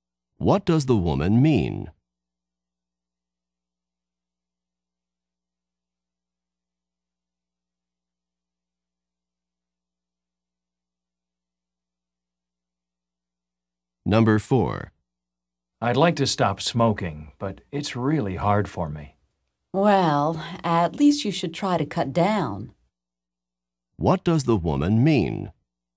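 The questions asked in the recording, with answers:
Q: What does the woman mean?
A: He should at least smoke less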